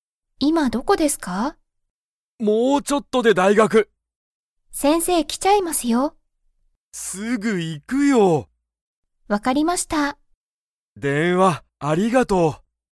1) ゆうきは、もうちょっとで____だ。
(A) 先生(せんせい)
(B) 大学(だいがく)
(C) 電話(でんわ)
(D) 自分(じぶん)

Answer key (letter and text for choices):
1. (B) 大学(だいがく)

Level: Level 1